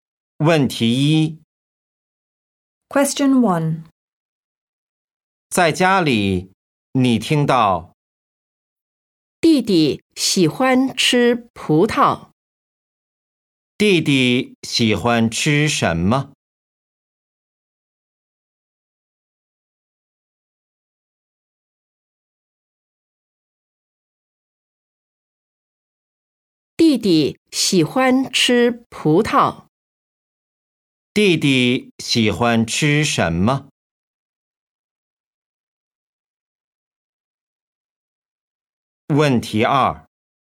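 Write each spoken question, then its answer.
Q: 弟弟喜欢吃什么?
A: 葡萄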